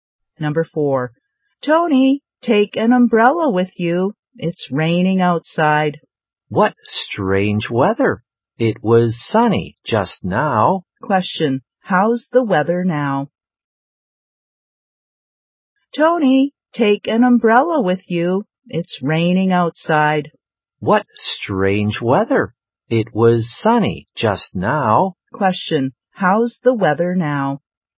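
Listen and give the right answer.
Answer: It's rainy.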